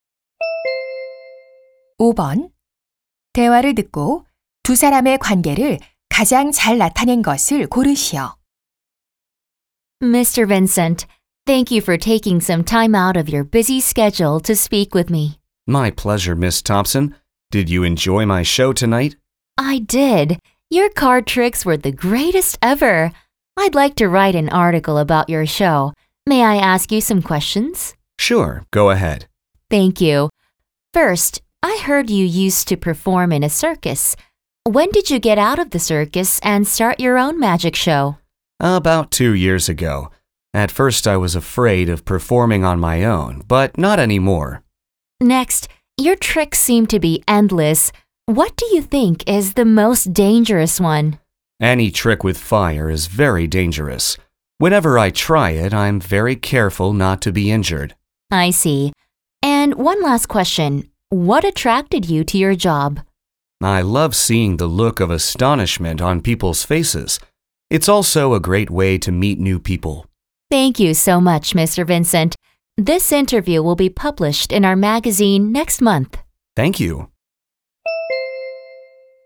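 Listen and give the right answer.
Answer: 마술사 – 잡지 기자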